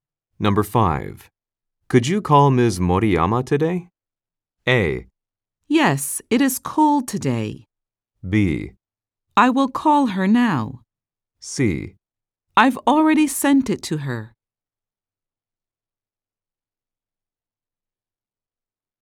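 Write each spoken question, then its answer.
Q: Could you call Ms. Moriyama today?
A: B: I will call her now.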